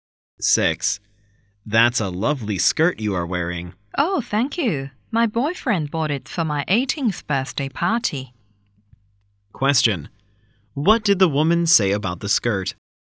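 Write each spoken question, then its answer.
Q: What did the woman say about the skirt?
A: It was a birthday gift from her boyfriend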